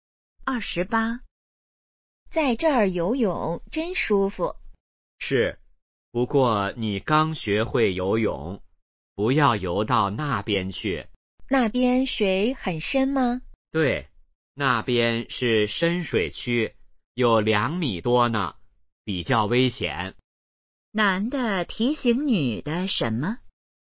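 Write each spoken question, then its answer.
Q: 男的提醒女的什么?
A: 不要游到深水区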